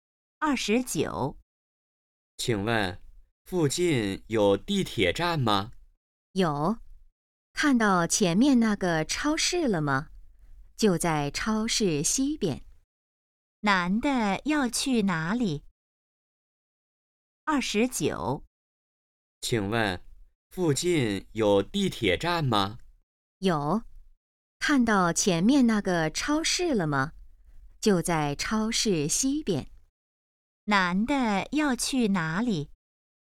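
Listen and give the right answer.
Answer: 地铁站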